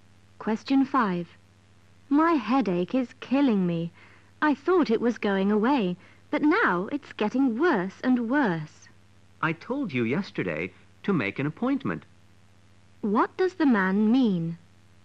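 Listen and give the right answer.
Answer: The woman should have made a doctor's appointment yesterday.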